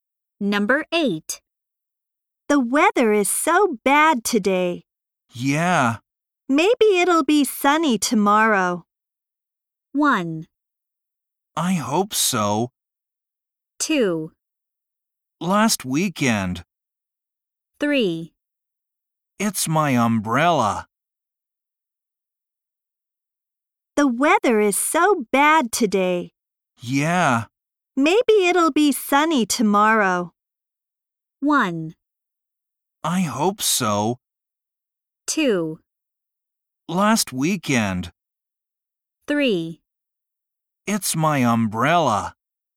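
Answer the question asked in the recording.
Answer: 1: I hope so.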